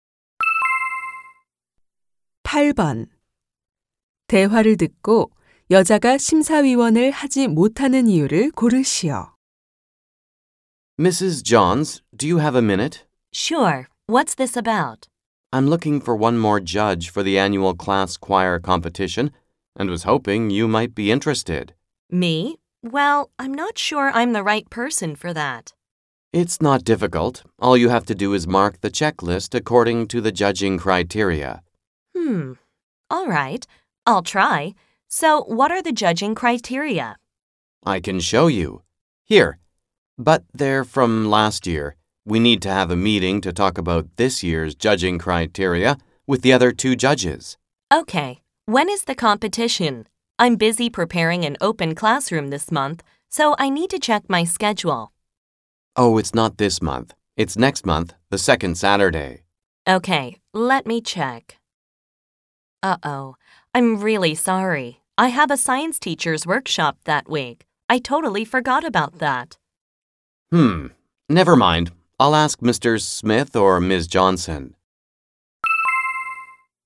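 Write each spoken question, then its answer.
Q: 대화를 듣고 여자가 심사위원을 하지 못하는 이유를 고르시오.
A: 과학 교사 워크숍이 있어서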